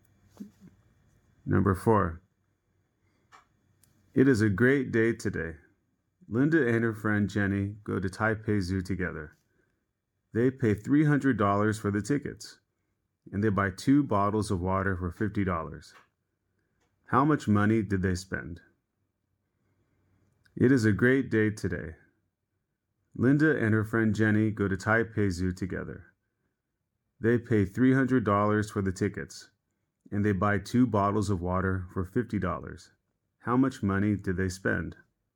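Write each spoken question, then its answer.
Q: How much money did they spend?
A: $350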